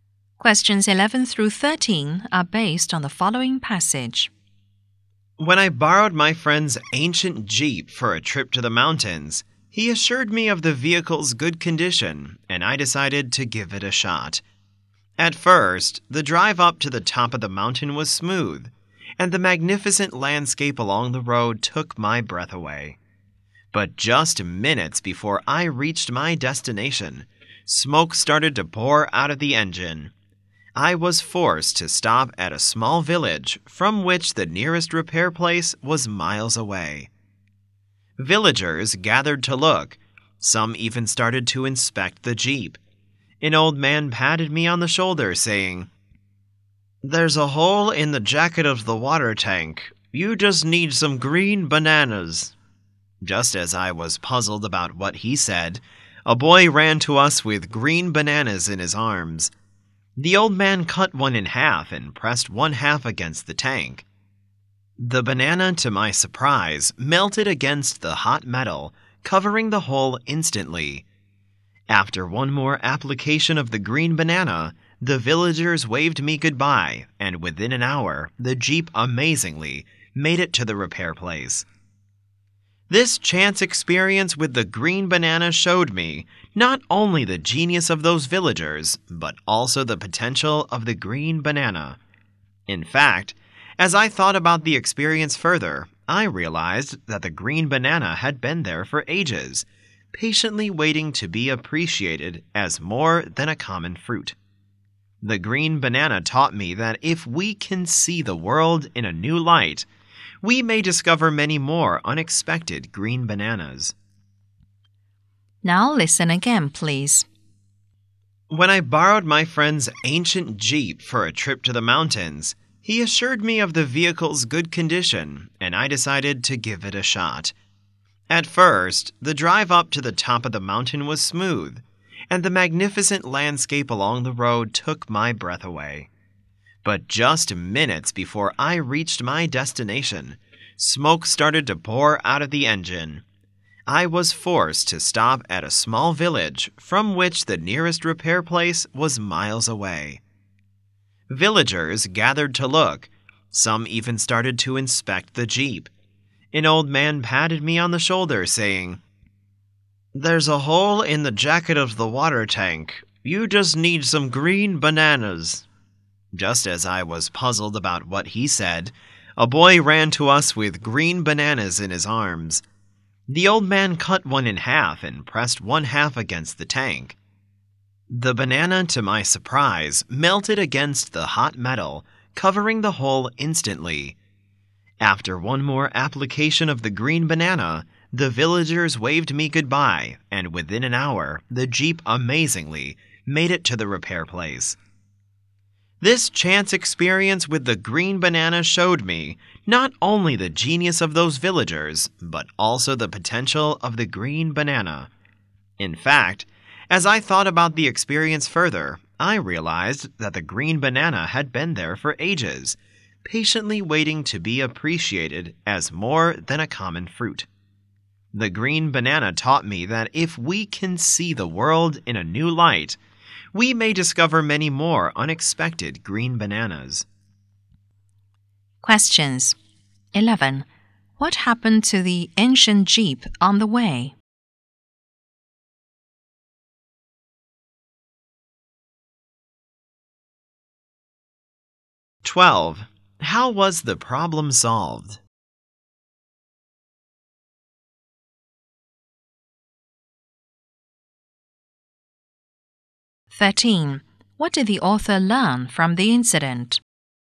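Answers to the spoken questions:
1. Smoke poured out of the engine; the water tank had a hole
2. Villagers covered the hole with green bananas
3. If we see the world in a new light, we may discover unexpected things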